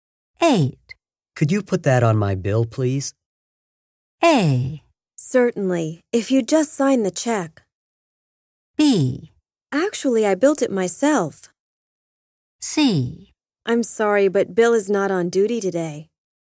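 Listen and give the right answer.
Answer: A: Certainly, if you'd just sign the check.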